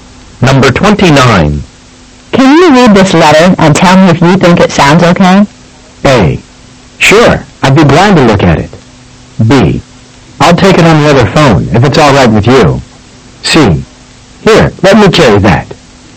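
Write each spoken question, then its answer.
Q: Can you read this letter and tell me if you think it sounds okay?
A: A: Sure, I'd be glad to look at it.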